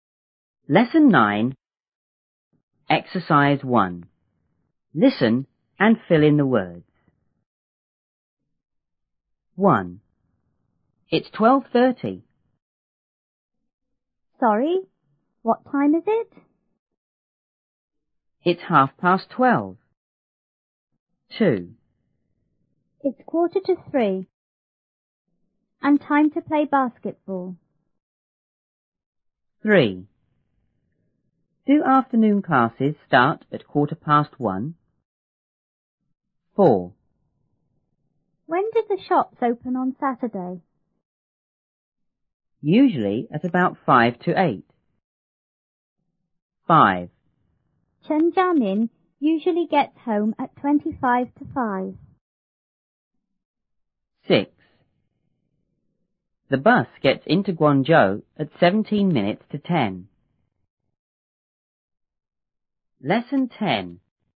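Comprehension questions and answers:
1.Listen and fill in the words.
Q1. B:Sorry?What ___ is it?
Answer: time

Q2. A:It's ___ ___ twelve.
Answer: half past

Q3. Do afternoon classes start at___ ___one?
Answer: quarter past

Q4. A:When___the shops open on Saturday?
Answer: do

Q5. B:Usually at about ___ ___ ___.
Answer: five to eight

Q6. Chen Jiamin usually gets home at___-___ ___five.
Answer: twenty-five past

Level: 初中英语广州版1B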